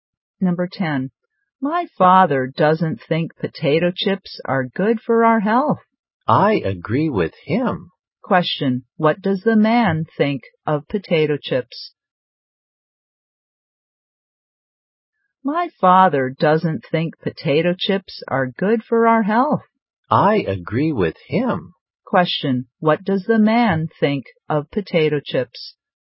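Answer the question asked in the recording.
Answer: They are not good for health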